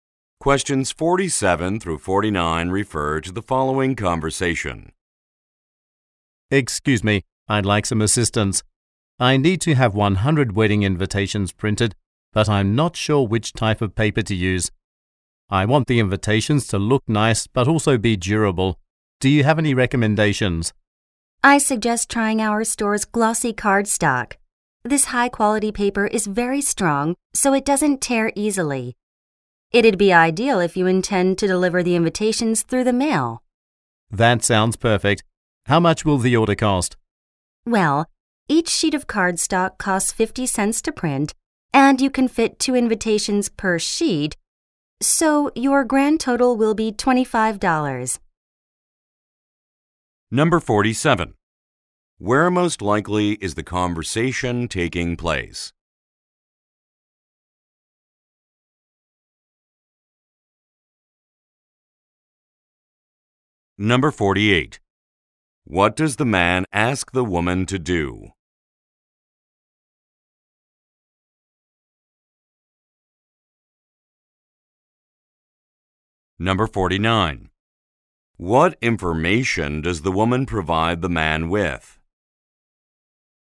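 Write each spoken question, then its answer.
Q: Where most likely is the conversation taking place?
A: At a print shop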